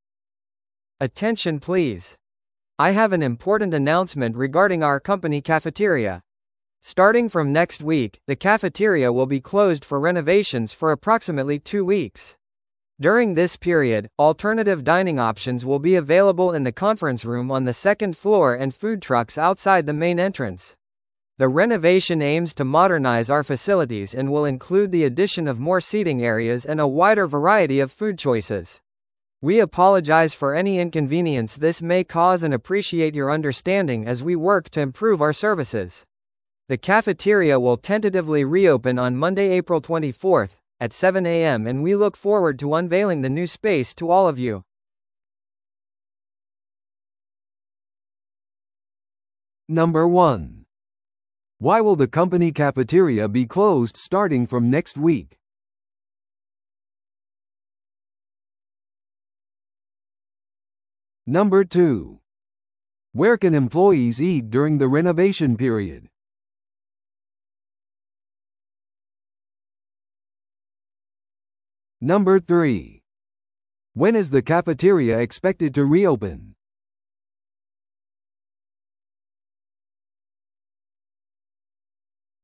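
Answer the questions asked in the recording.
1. For renovations
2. In the conference room on the second floor and at food trucks outside the main entrance
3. Monday, April 24th, at 7 a.m.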